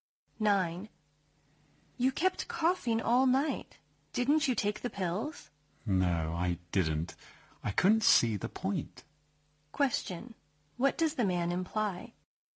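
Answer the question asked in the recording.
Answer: He thinks the pills are useless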